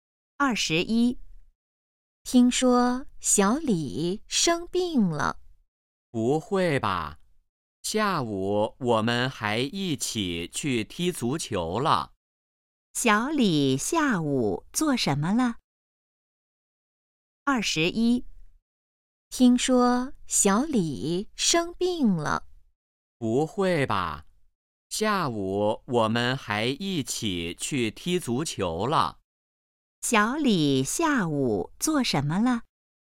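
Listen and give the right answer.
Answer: 踢足球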